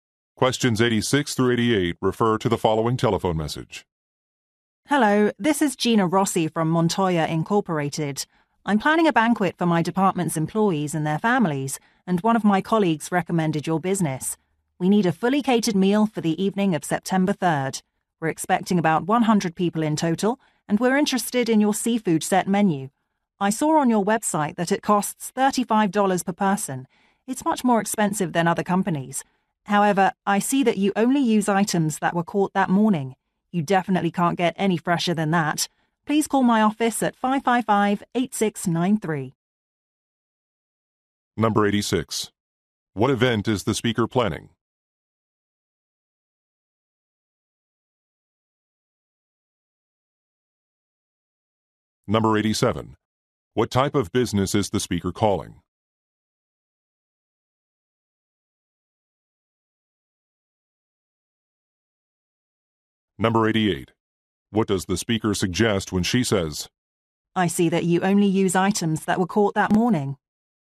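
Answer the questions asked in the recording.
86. A banquet for employees and their families
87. A catering company
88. The higher price is justified by the freshness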